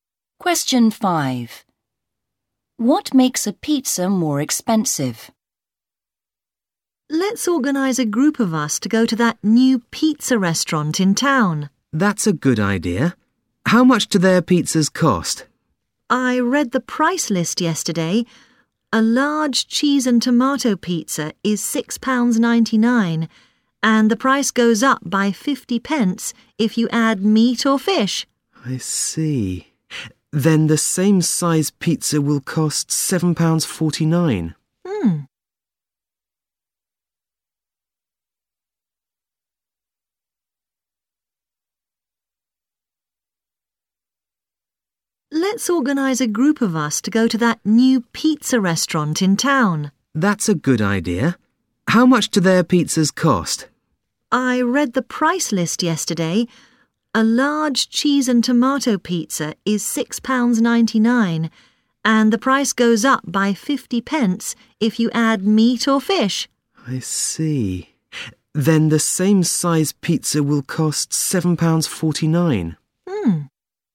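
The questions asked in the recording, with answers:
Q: What makes a pizza more expensive?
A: Adding meat or fish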